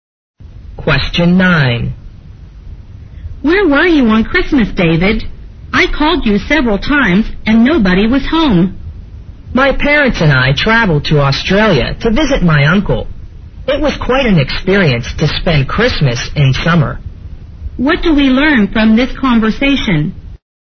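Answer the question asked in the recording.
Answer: David spent Christmas with his uncle in Australia, where it was summer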